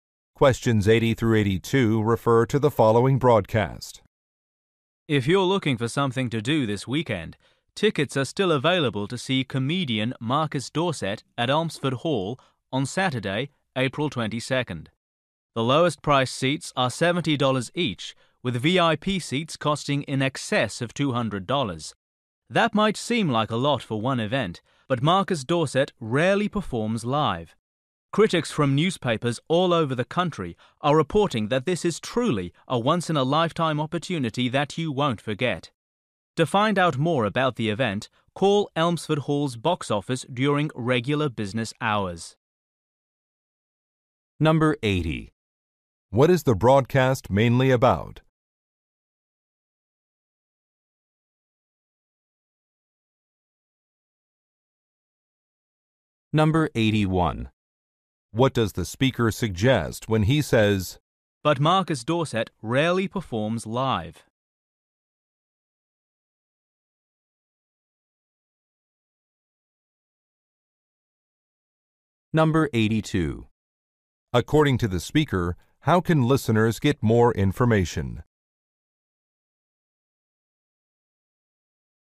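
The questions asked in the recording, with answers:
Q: What is the broadcast mainly about?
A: A comedy show by Marcus Dorset

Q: According to the speaker, how can listeners get more information?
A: By calling the box office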